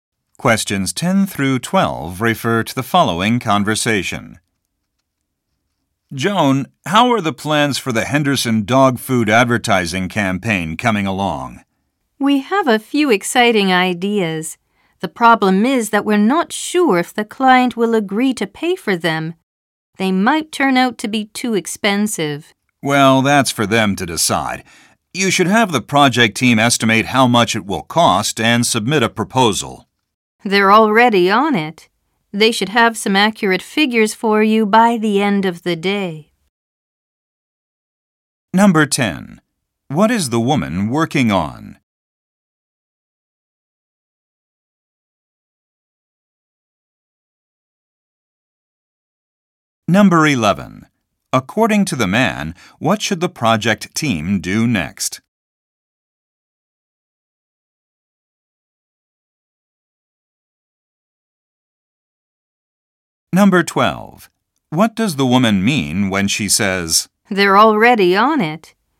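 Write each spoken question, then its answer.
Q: What is the woman working on?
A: An advertising campaign for Henderson dog food

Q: According to the man, what should the project team do next?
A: Estimate the cost and submit a proposal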